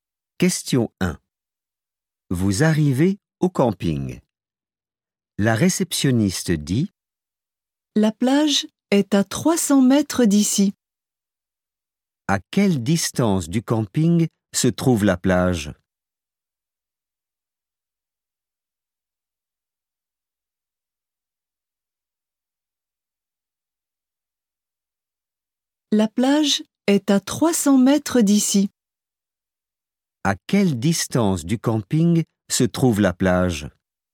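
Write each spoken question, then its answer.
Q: À quelle distance du camping se trouve la plage ?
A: 300 mètres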